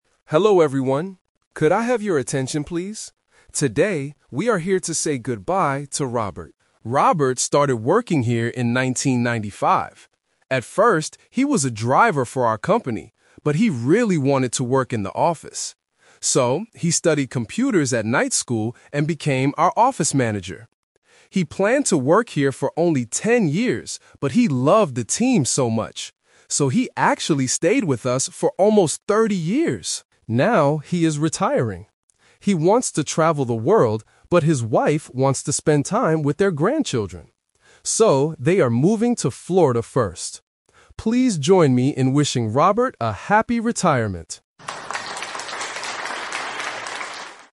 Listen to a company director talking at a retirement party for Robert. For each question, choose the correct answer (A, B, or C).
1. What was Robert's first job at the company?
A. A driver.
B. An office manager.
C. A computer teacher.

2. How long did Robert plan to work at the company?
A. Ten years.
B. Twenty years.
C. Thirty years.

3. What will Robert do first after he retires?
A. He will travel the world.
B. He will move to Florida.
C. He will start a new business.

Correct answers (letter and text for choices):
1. A. A driver.
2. A. Ten years.
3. B. He will move to Florida.

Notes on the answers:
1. The director clearly states, "At first, he was a driver for our company..." Why the traps are wrong: Option B is a "Twist Trap". He became an office manager later after studying computers. Option C is incorrect because he studied computers, but he didn't teach them.
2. The director says, "He planned to work here for only ten years..." Why the traps are wrong: Option C is the "Twist Trap". He actually stayed for almost thirty years, but his original plan was only ten years. Option B is not mentioned.
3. The director explains the final decision: "So, they are moving to Florida first." Why the traps are wrong: Option A is the trap. Robert wants to travel the world, but because of his wife's wish to see their grandchildren, they are moving to Florida instead. Option C is not mentioned.

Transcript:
Director: Hello everyone. Could I have your attention, please? Today, we are here to say goodbye to Robert.
Robert started working here in 1995. At first, he was a driver for our company, but he really wanted to work in the office. So, he studied computers at night school and became our office manager. He planned to work here for only ten years, but he loved the team so much. So, he actually stayed with us for almost thirty years!
Now, he is retiring. He wants to travel the world, but his wife wants to spend time with their grandchildren. So, they are moving to Florida first. Please join me in wishing Robert a happy retirement!